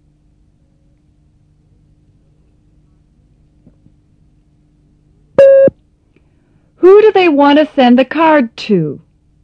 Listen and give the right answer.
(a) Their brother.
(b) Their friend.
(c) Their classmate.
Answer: (b) Their friend.